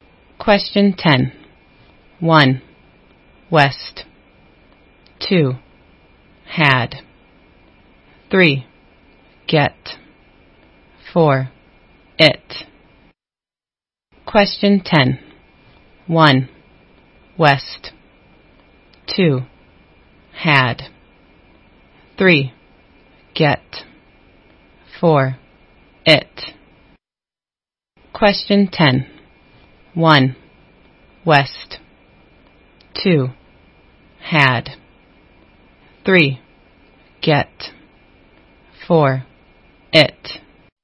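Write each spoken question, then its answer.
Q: Question 10. 1. West. 2. Had.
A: 2: had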